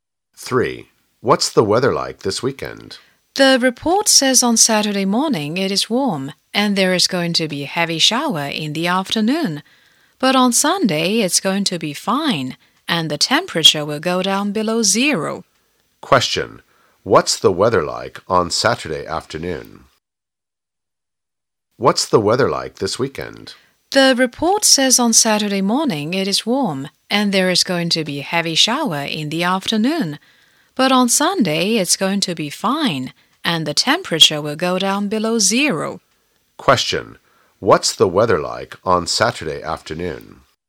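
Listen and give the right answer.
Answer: There will be a heavy shower (rainy)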